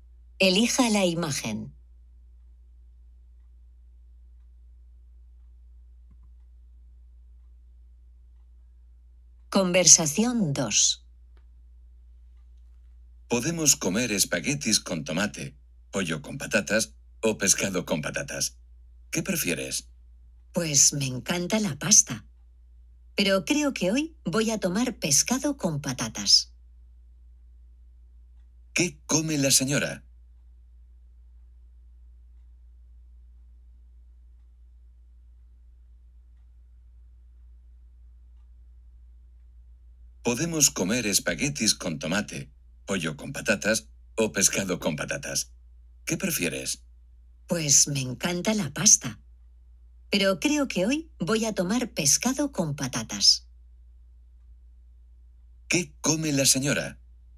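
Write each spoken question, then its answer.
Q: ¿Qué come la señora?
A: Pescado con patatas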